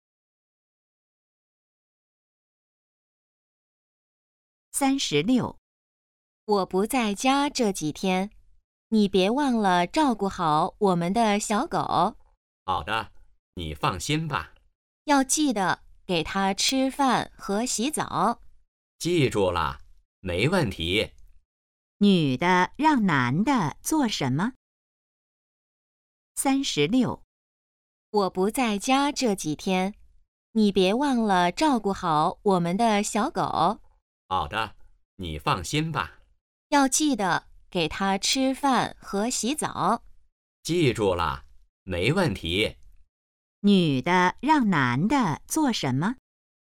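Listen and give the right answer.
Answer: 照顾小狗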